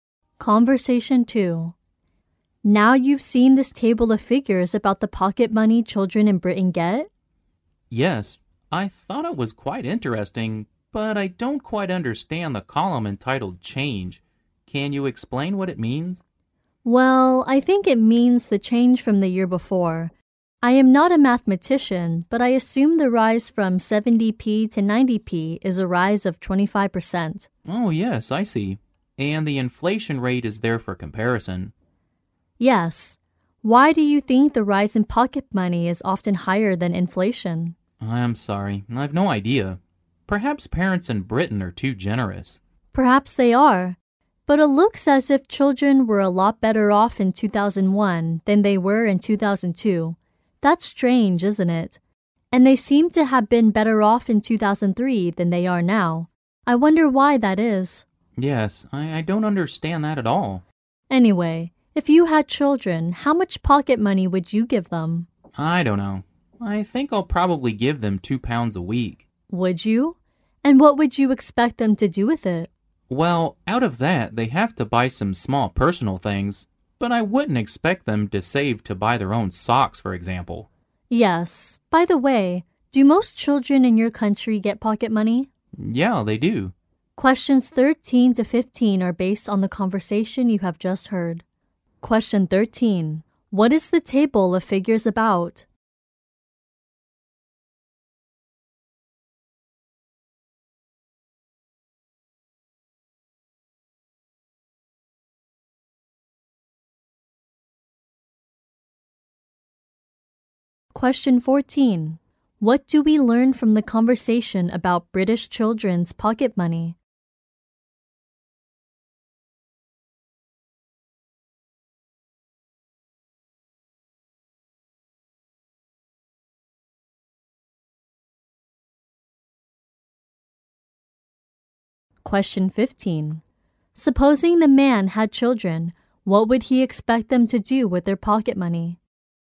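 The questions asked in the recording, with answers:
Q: What is the table of figures about?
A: The pocket money children in Britain get.

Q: Supposing the man had children, what would he expect them to do with their pocket money?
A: Buy some small personal things.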